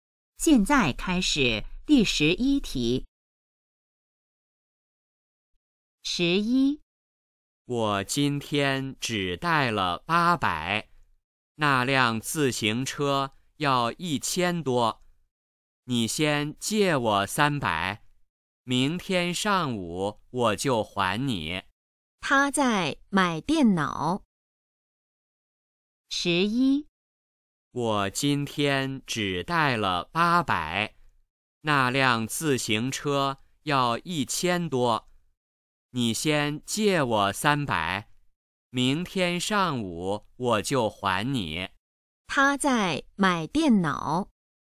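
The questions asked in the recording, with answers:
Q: 他在买电脑。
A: 错(他在买自行车)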